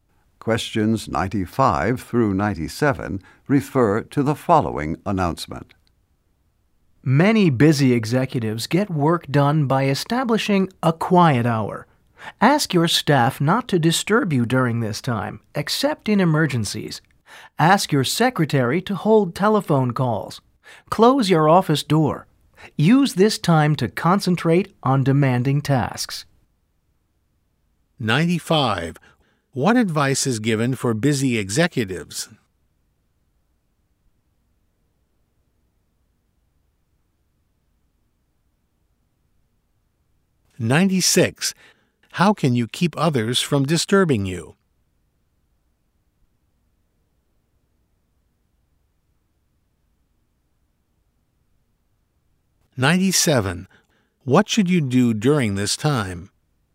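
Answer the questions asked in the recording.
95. Establish a quiet hour
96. Ask staff not to disturb you, have your secretary hold calls and close your door
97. Concentrate on demanding tasks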